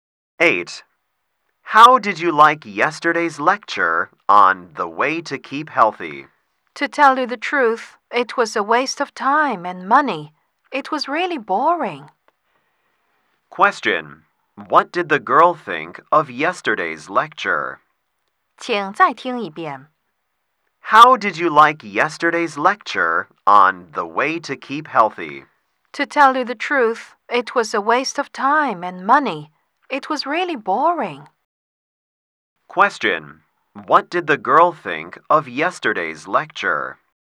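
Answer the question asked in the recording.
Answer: It was boring, a waste of time and money.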